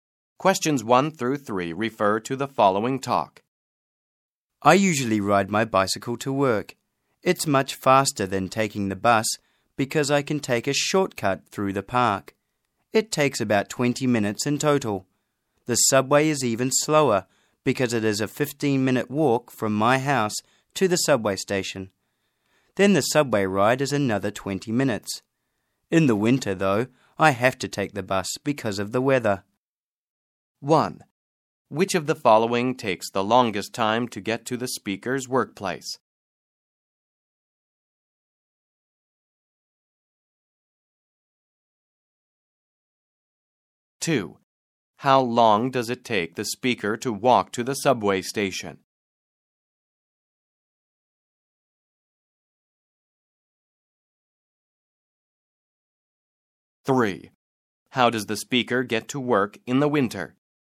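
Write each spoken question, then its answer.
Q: Which of the following takes the longest time to get to the speaker's workplace?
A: The subway

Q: How long does it take the speaker to walk to the subway station?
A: 15 minutes

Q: How does the speaker get to work in the winter?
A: By bus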